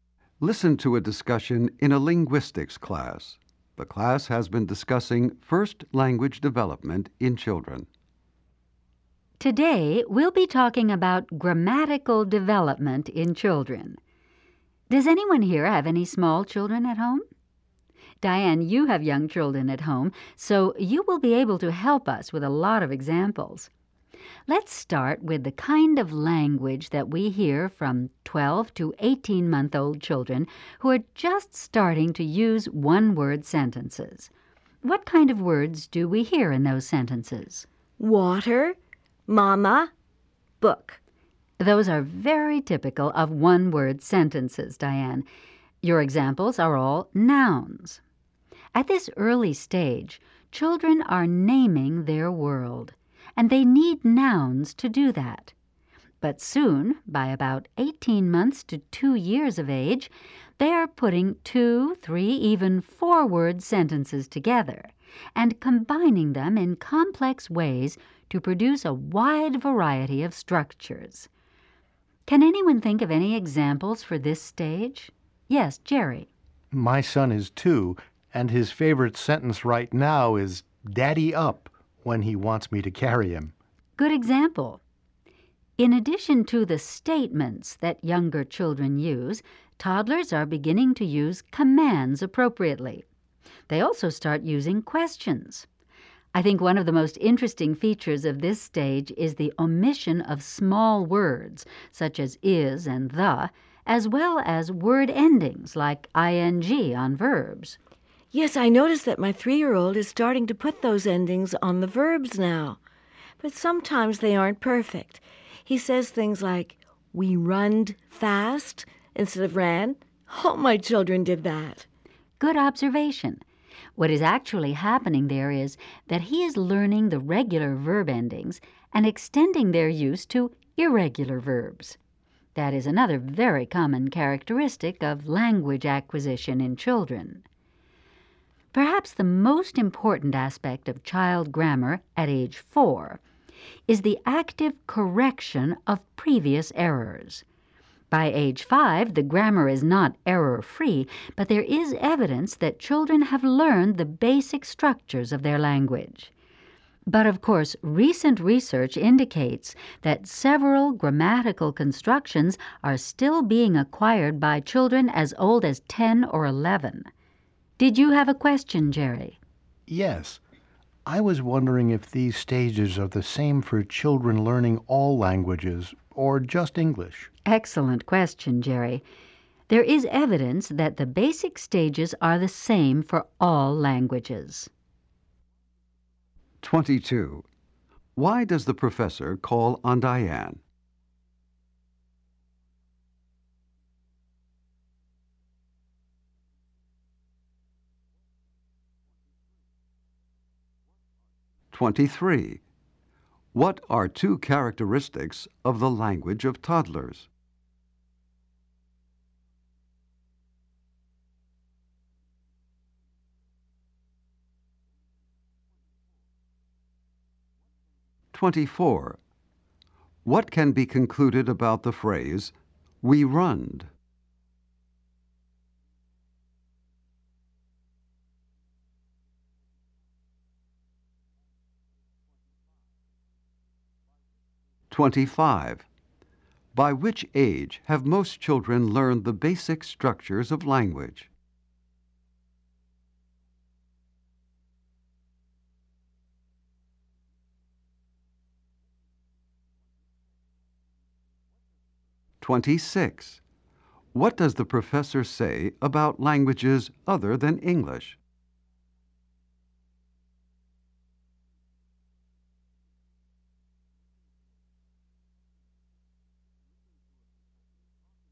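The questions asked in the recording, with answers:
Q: Why does the professor call on Diane?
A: She has young children at home

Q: What can be concluded about the phrase, "We runned"?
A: The child is using the regular verb ending on an irregular verb

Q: By which age have most children learned the basic structures of language?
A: By age 5

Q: What does the professor say about languages other than English?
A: The basic stages are the same for all languages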